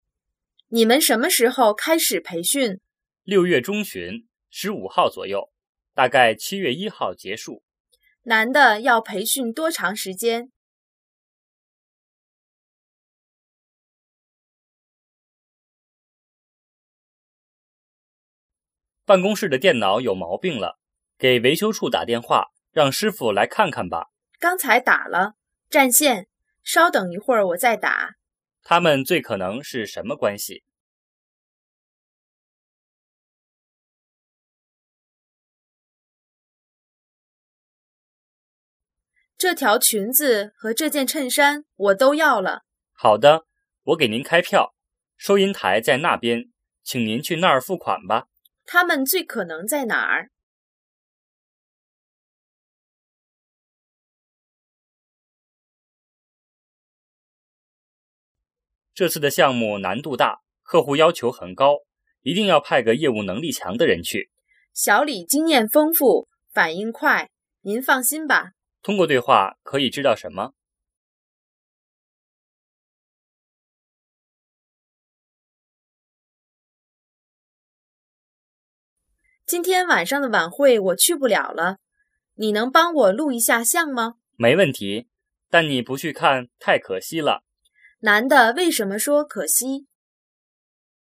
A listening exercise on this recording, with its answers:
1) 男的要培训多长时间?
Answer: 半个月

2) 他们最可能是什么关系?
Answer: 同事

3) 他们最可能在哪儿?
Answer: 商场

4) 通过对话,可以知道什么?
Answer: 小李的工作经验丰富

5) 男的为什么说可惜?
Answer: 女的不能去看晚会

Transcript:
男:办公室的电脑有毛病了,给维修处打电话,让师傅来看看吧。
女:刚才打了,占线,稍等一会儿我再打。
问:他们最可能是什么关系?
女:这条裙子和这件衬衫我都要了。
男:好的,我给您开票,收银台在那边,请您去那儿付款吧。
男:这次的项目难度大,客户要求很高,一定要派个业务能力强的人去。
女:小李经验丰富,反应快,您放心吧。
问:通过对话,可以知道什么?
女:今天晚上的晚会我去不了了,你能帮我录一下像吗?
男:没问题。但你不去看,太可惜了。
问:男的为什么说可惜?

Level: 汉语水平考试(HSK)五级